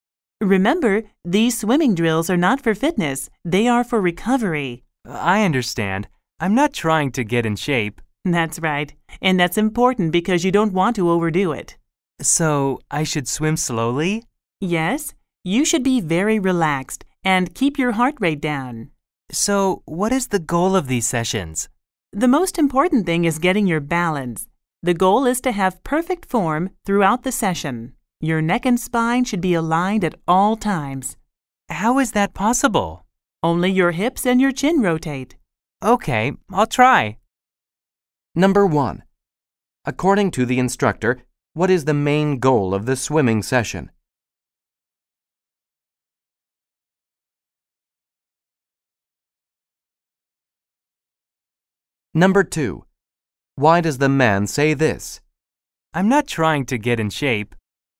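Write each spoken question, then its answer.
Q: According to the instructor, what is the main goal of the swimming session?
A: To get balance and keep perfect form throughout the session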